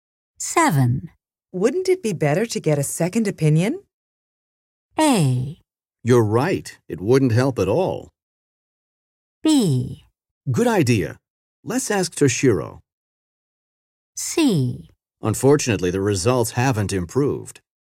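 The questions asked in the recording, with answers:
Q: Wouldn't it be better to get a second opinion?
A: B: Good idea. Let's ask Toshiro.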